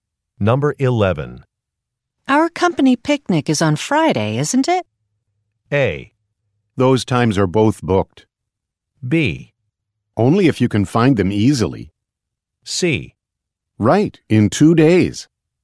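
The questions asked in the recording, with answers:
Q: Our company picnic is on Friday, isn't it?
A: C: Right, in 2 days.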